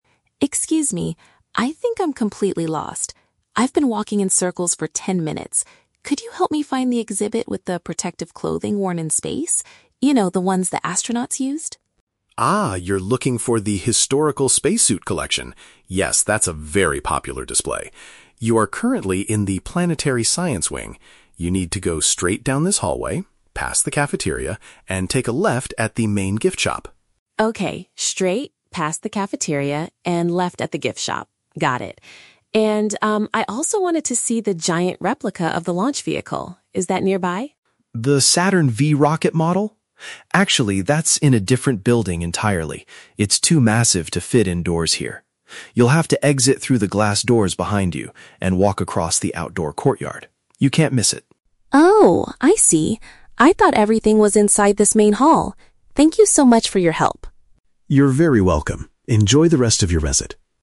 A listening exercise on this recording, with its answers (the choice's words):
Listen to the conversation between a lost visitor and a museum security guard. Choose the correct answer (A, B, or C) for each question.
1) What is the visitor trying to find first?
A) The special garments used by space explorers.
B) A place to sit down and buy food or drinks.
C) A presentation about planetary science.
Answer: The special garments used by space explorers.

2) How should the visitor navigate to the spacesuit collection?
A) By going right before reaching the main dining area.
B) By turning left after passing a store that sells souvenirs.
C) By taking an elevator up to the second floor of the building.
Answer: By turning left after passing a store that sells souvenirs.

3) Why is the rocket model located in a different area?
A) Because it is currently being repaired in the outdoor courtyard.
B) Because it is the newest exhibit and needs a separate ticket.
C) Because its physical dimensions are too large for the current building.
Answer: Because its physical dimensions are too large for the current building.

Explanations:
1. The visitor asks for the "protective clothing worn in space" which the guard confirms is the "spacesuit collection" (special garments). Option (B) is The Trap: The guard mentions the "cafeteria" (a place for food), but only as a landmark to walk past. Option (C) is also a trap: The "planetary science wing" is where they currently are, not what the visitor is looking for.
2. The guard says to go "past the cafeteria, and take a left at the main gift shop." A gift shop is a "store that sells souvenirs." Option (A) is The Trap: The directions say to go past the cafeteria and turn left, not turn right before it. Option (C) is plausible in a museum context but is not mentioned in the audio.
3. The guard states that the rocket is "too massive to fit indoors here." "Massive" means having very large physical dimensions. Option (A) is The Trap: The "outdoor courtyard" is mentioned as the place the visitor needs to walk across, but there is no mention of the rocket being repaired. Option (B) is not mentioned.

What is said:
Visitor: Excuse me, I think I'm completely lost. I've been walking in circles for ten minutes. Could you help me find the exhibit with the protective clothing worn in space? You know, the ones the astronauts used.
Guard: Ah, you're looking for the historical spacesuit collection. Yes, that's a very popular display. You are currently in the planetary science wing. You need to go straight down this hallway, past the cafeteria, and take a left at the main gift shop.
Visitor: Okay, straight, past the cafeteria, and left at the gift shop. Got it. And, um, I also wanted to see the giant replica of the launch vehicle. Is that nearby?
Guard: The Saturn V rocket model? Actually, that's in a different building entirely. It's too massive to fit indoors here. You'll have to exit through the glass doors behind you and walk across the outdoor courtyard. You can't miss it.
Visitor: Oh, I see! I thought everything was inside this main hall. Thank you so much for your help.